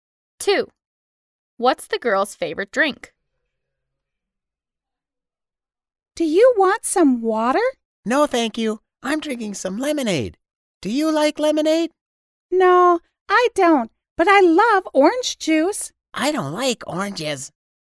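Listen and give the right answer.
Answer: orange juice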